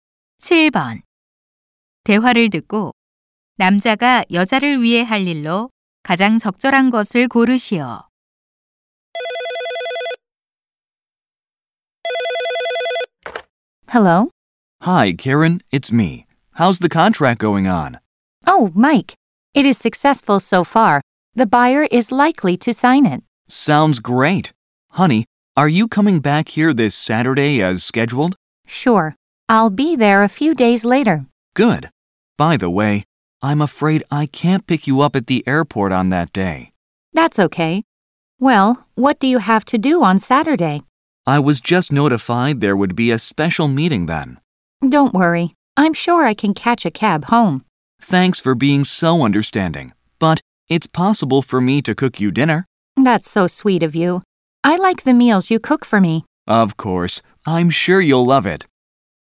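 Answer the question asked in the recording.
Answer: 저녁 식사 요리해 주기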